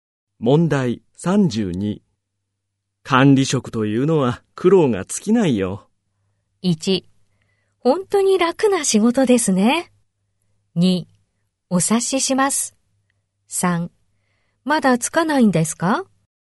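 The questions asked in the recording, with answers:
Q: 管理職というのは苦労が尽きないよ。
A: 2: お察しします。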